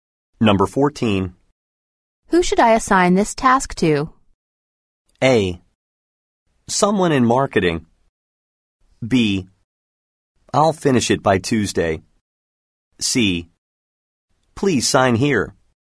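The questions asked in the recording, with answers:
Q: Who should I assign this task to?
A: A: Someone in marketing.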